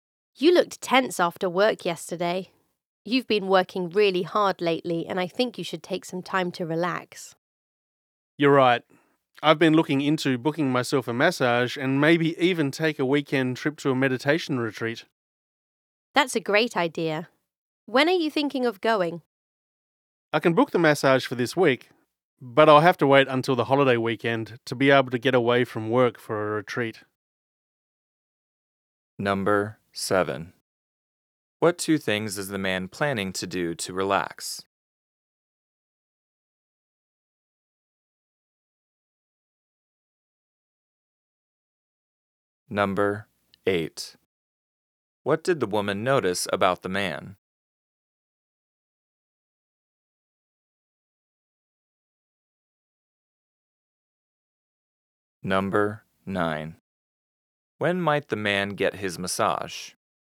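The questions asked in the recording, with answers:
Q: What two things is the man planning to do to relax?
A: Get a massage and go on a weekend meditation retreat

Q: What did the woman notice about the man?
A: He looked tense after work

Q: When might the man get his massage?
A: This week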